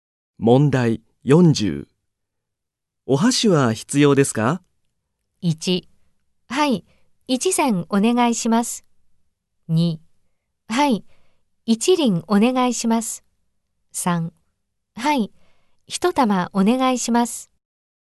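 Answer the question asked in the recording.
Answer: 1: はい、1膳お願いします。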